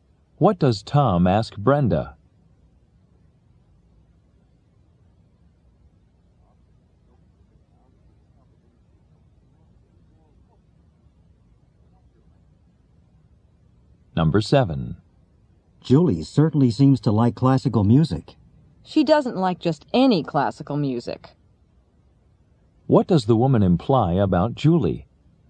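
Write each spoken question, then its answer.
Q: What does the woman imply about Julie?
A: She only likes certain kinds of classical music.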